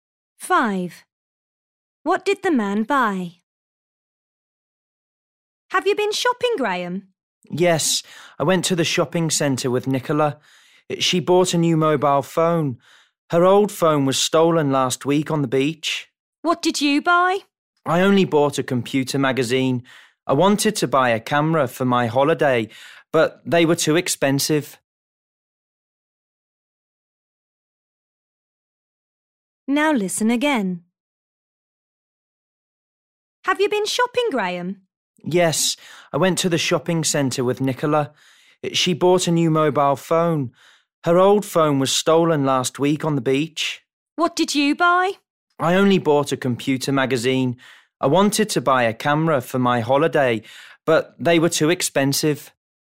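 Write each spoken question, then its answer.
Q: What did the man buy?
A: A computer magazine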